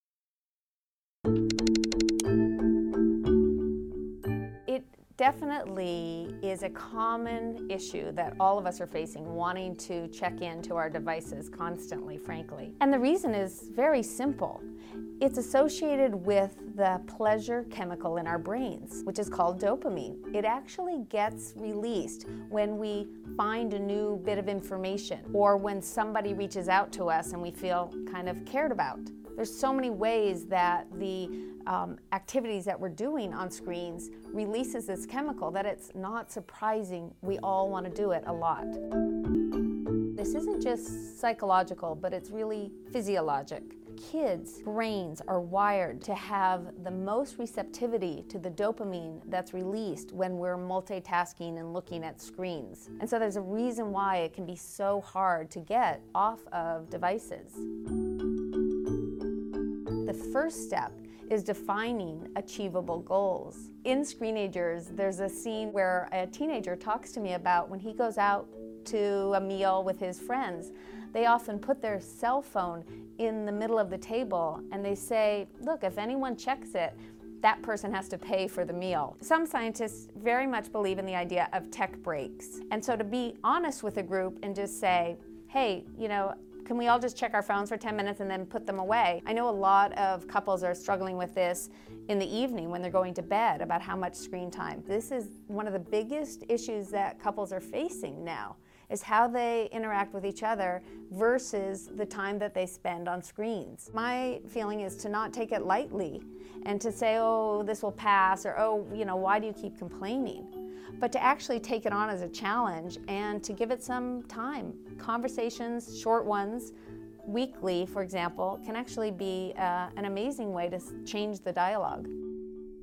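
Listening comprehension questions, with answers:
Listen to the recording Smartphone addiction and do the comprehension activity below: Choose the right answer according to what you hear.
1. The reason why we want to check our phones all the time is because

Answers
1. it releases dopamine, the pleasure chemical in our brains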